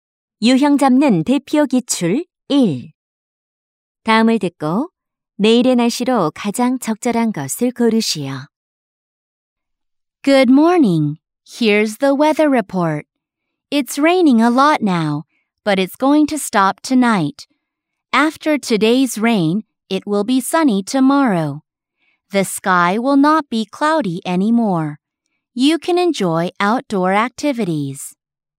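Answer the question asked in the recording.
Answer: 맑음 (sunny)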